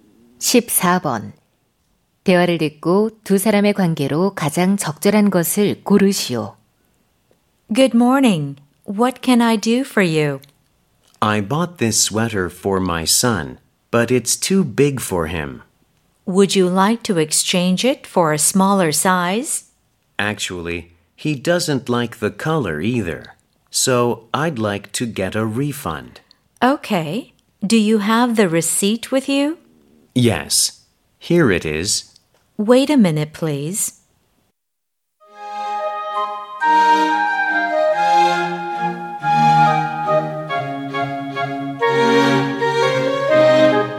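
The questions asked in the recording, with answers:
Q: 대화를 듣고 두 사람의 관계로 가장 적절한 것을 고르시오.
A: 점원과 손님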